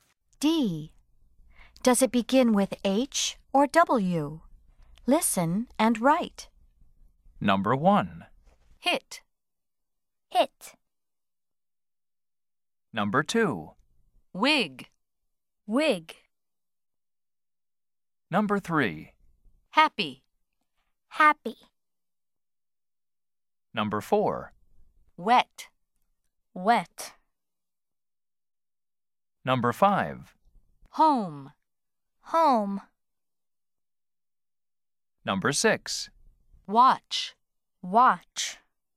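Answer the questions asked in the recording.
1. H (hit)
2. W (wig)
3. H (happy)
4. W (wet)
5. H (home)
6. W (watch)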